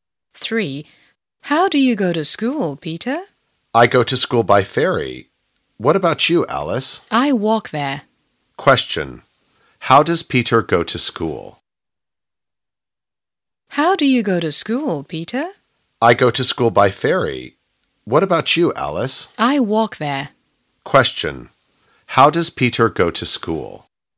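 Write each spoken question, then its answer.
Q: How does Peter go to school?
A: By ferry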